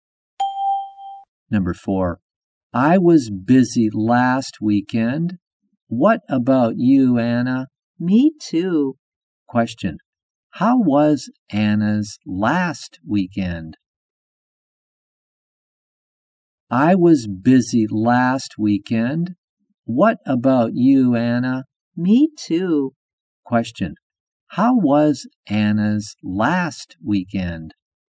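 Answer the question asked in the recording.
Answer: She was busy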